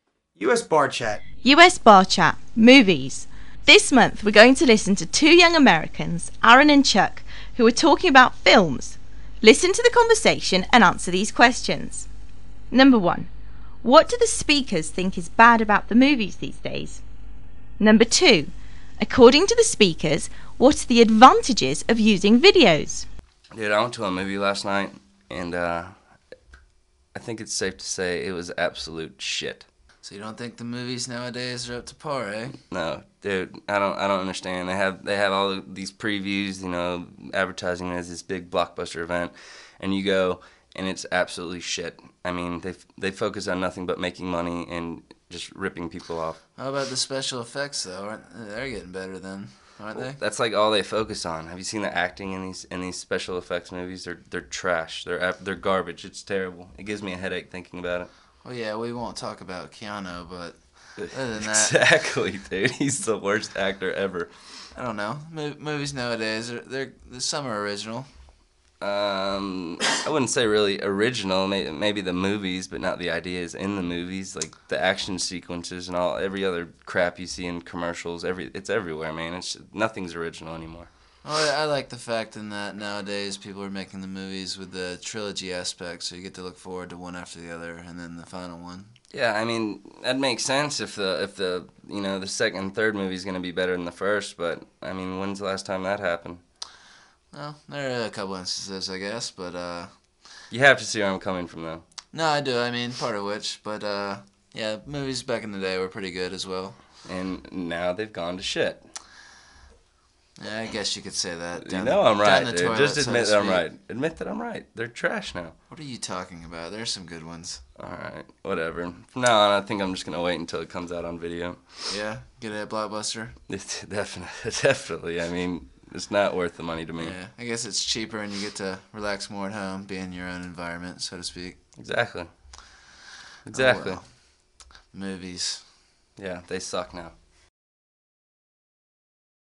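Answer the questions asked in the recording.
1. They focus only on making money and special effects, the acting is bad, and nothing is original
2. It's cheaper, and you can relax more at home in your own environment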